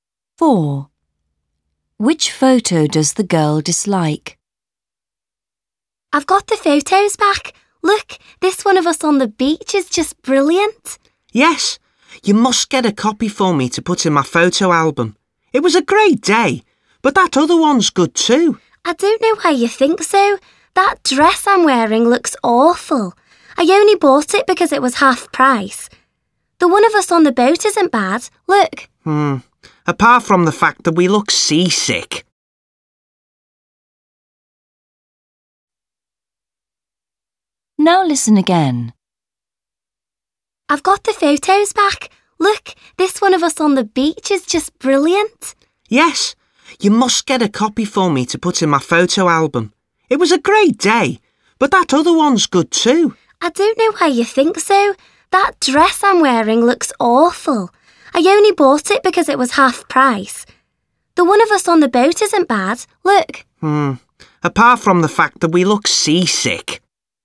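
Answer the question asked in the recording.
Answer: The one where she is wearing the awful dress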